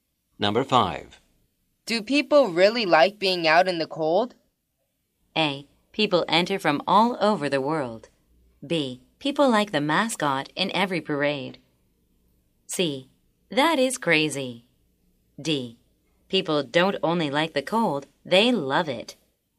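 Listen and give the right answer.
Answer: D: People don't only like the cold, they love it.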